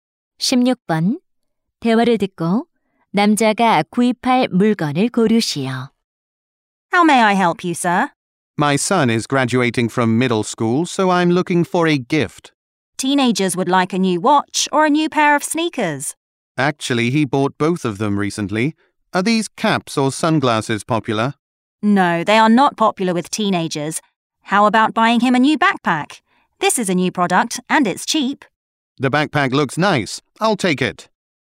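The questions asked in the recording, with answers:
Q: 대화를 듣고 남자가 구입할 물건을 고르시오.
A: 배낭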